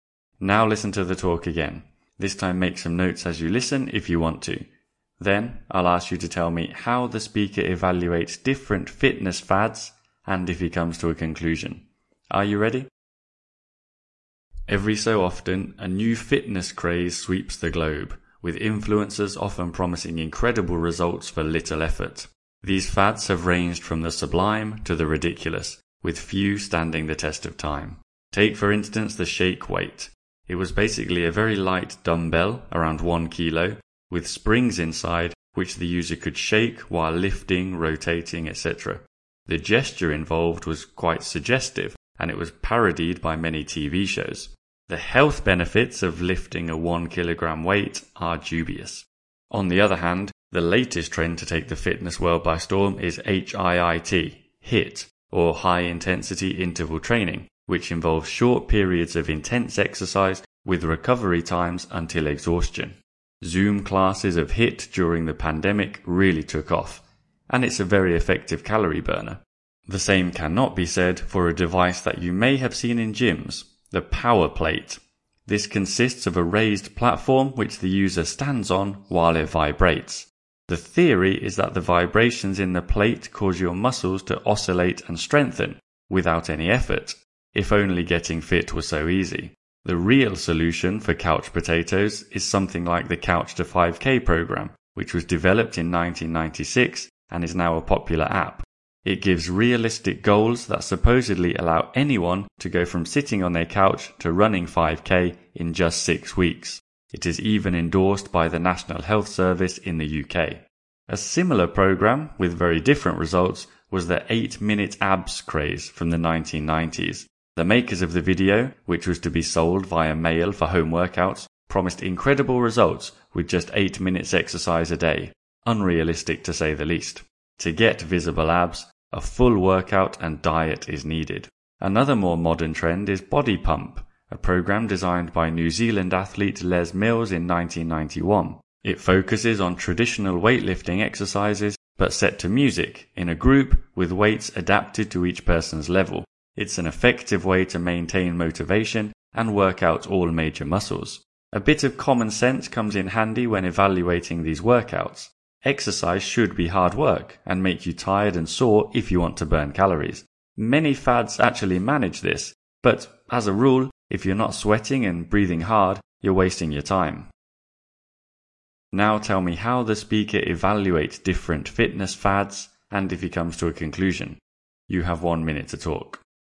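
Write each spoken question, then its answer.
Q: Now tell me how the speaker evaluates different fitness fads and if he comes to a conclusion.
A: He says some fads are ineffective (Shake Weight, Power Plate, 8-minute abs) and others effective (HIIT, Couch to 5K, Body Pump). His conclusion is that exercise must be hard work: if you're not sweating and breathing hard, you're wasting your time.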